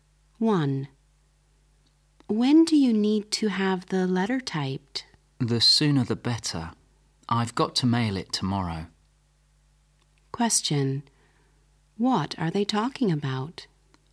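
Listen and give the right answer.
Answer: Having a letter typed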